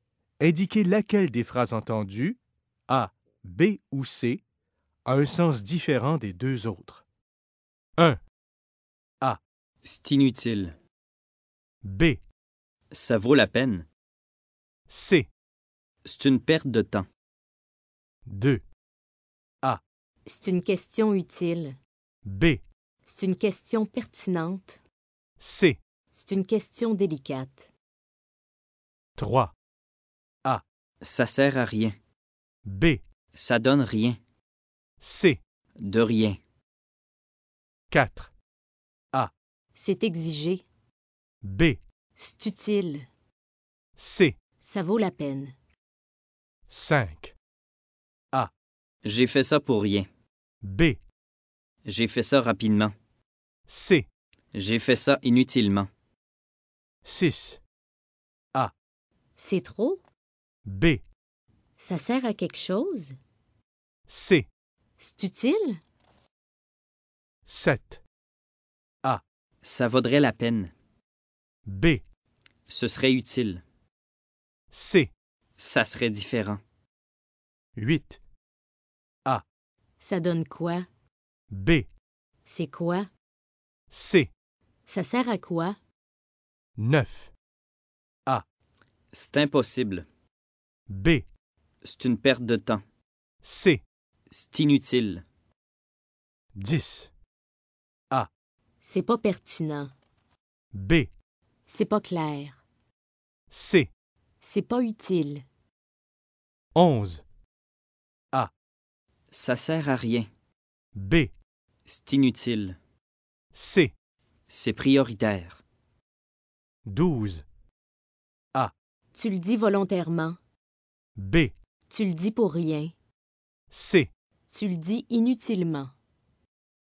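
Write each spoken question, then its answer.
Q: Indiquez laquelle des phrases entendues, A, B ou C, a un sens différent des deux autres.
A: B: Ça vaut la peine.

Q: Indiquez laquelle des phrases entendues, A, B ou C, a un sens différent des deux autres.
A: C: C'est une question délicate.

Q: Indiquez laquelle des phrases entendues, A, B ou C, a un sens différent des deux autres.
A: C: De rien.

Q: Indiquez laquelle des phrases entendues, A, B ou C, a un sens différent des deux autres.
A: A: C'est exigé.

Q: Indiquez laquelle des phrases entendues, A, B ou C, a un sens différent des deux autres.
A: B: J'ai fait ça rapidement.

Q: Indiquez laquelle des phrases entendues, A, B ou C, a un sens différent des deux autres.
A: A: C'est trop.

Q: Indiquez laquelle des phrases entendues, A, B ou C, a un sens différent des deux autres.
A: C: Ça serait différent.

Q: Indiquez laquelle des phrases entendues, A, B ou C, a un sens différent des deux autres.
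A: B: C'est quoi?

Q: Indiquez laquelle des phrases entendues, A, B ou C, a un sens différent des deux autres.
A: A: C'est impossible.

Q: Indiquez laquelle des phrases entendues, A, B ou C, a un sens différent des deux autres.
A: B: C'est pas clair.

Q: Indiquez laquelle des phrases entendues, A, B ou C, a un sens différent des deux autres.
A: C: C'est prioritaire.

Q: Indiquez laquelle des phrases entendues, A, B ou C, a un sens différent des deux autres.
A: A: Tu le dis volontairement.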